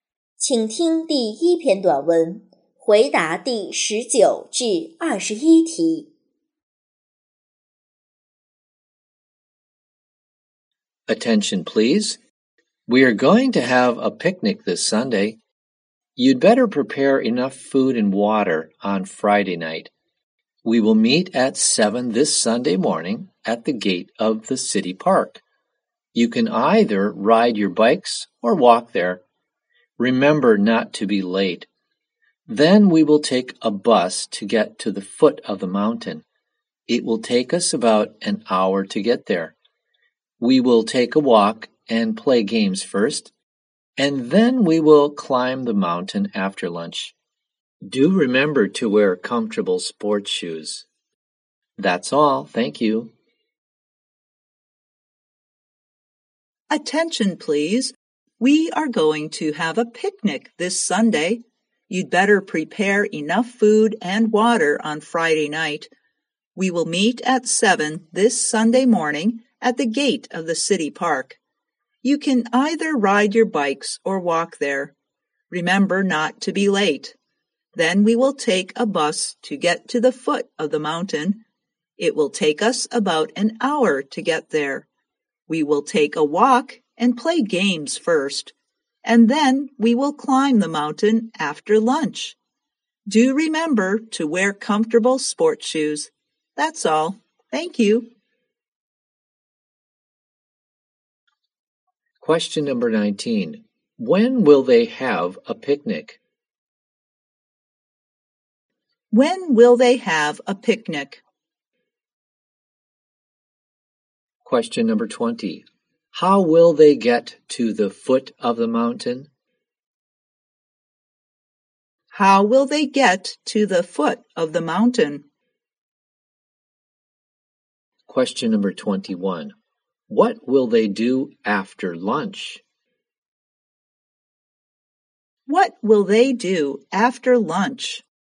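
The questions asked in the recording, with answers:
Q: When will they have a picnic?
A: This Sunday

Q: How will they get to the foot of the mountain?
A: By bus

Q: What will they do after lunch?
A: Climb the mountain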